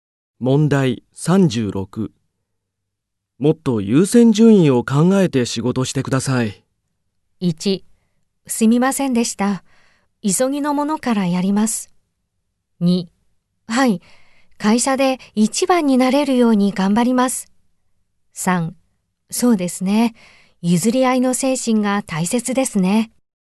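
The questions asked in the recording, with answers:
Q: もっと優先順位を考えて仕事してください。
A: 1: すみませんでした。急ぎのものからやります。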